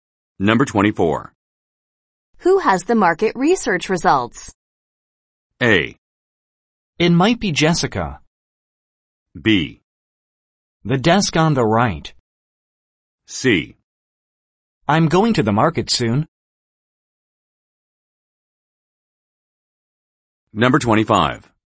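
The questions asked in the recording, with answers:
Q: Who has the market research results?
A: A: It might be Jessica.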